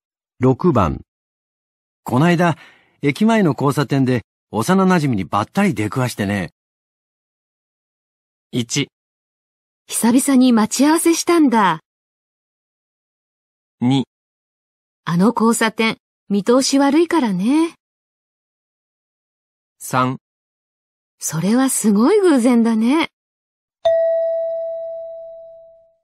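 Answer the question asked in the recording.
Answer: 3: それはすごい偶然だね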